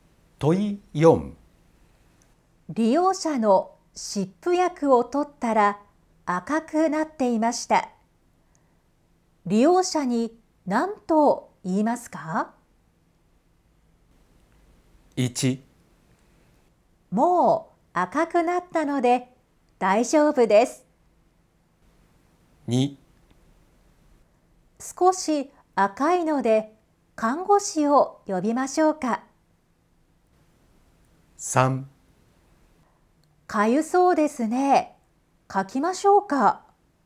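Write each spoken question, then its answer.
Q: 利用者に何と言いますか?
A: 2: 少し赤いので看護師を呼びましょうか?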